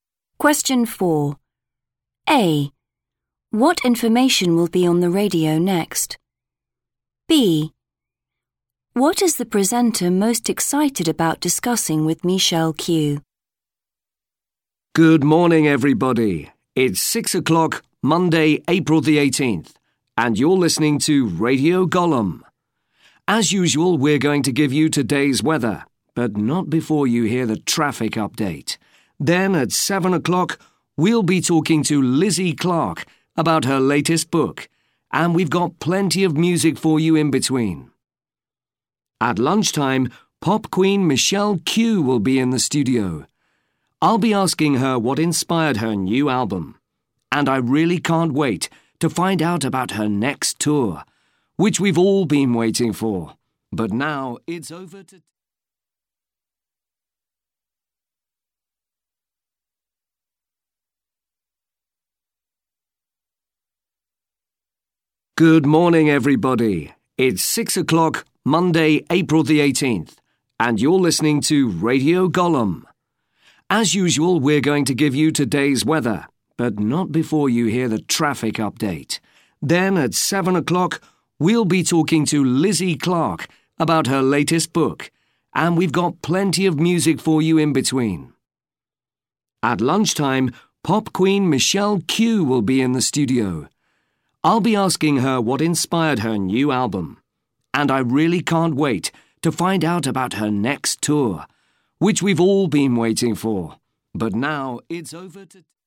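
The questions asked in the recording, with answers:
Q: What information will be on the radio next?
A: Traffic update

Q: What is the presenter most excited about discussing with Michelle Q?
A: Her next tour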